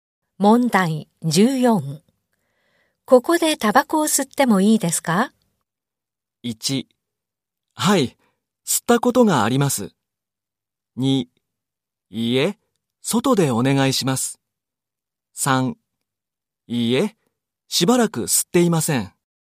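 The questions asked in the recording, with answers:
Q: ここでタバコを吸ってもいいですか?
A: 2: いいえ、外でお願いします。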